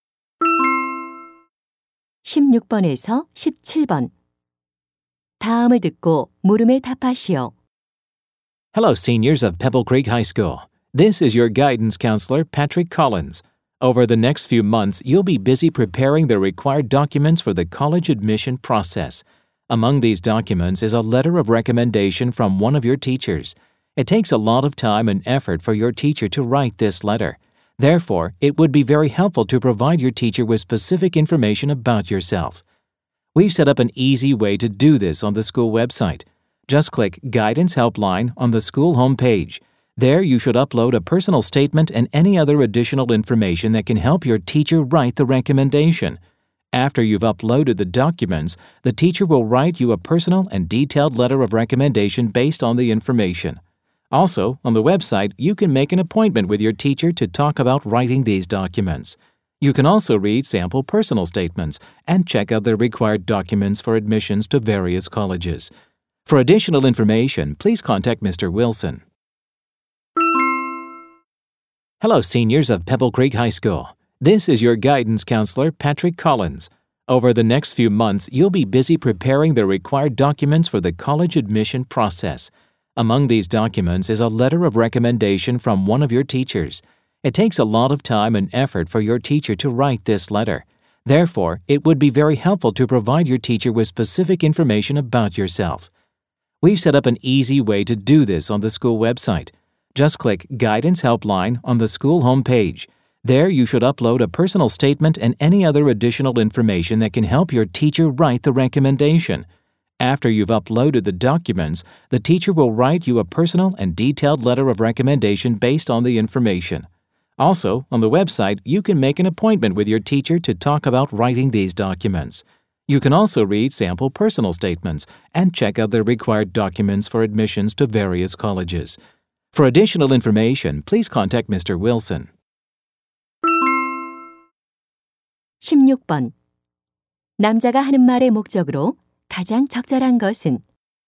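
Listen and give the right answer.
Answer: 추천서 작성을 위한 학교 웹사이트 이용 안내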